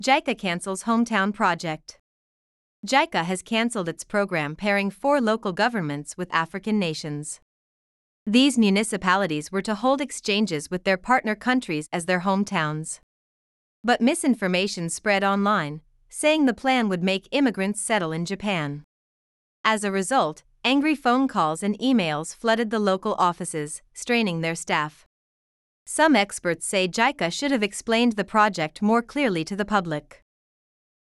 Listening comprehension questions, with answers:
次の各質問の答えを探しながら聞きましょう。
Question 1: What has JICA canceled?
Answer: It has canceled its program pairing four local governments with African nations.

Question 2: What happened after misinformation spread online?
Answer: Angry phone calls and emails flooded the local offices, straining their staff.

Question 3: What should JICA have done, according to some experts?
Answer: Some experts say JICA should have explained the project more clearly to the public.

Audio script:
JICA Cancels "Hometown" Project
JICA has canceled its program pairing four local governments with African nations.
These municipalities were to hold exchanges with their partner countries as their "hometowns".
But misinformation spread online, saying the plan would make immigrants settle in Japan.
As a result, angry phone calls and emails flooded the local offices, straining their staff.
Some experts say JICA should have explained the project more clearly to the public.